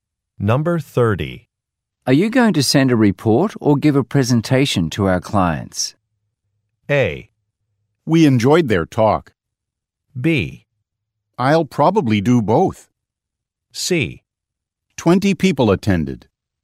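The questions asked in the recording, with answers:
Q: Are you going to send a report or give a presentation to our clients?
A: B: I'll probably do both.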